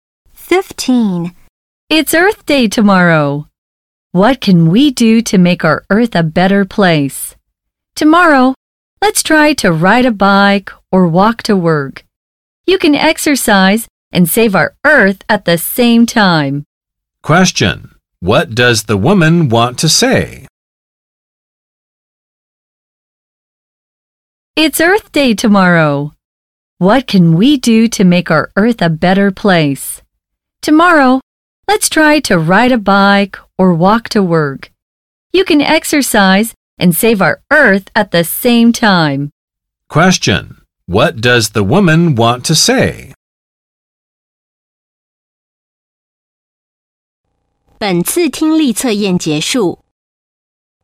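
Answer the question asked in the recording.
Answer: Let's ride a bike or walk to work to help save the Earth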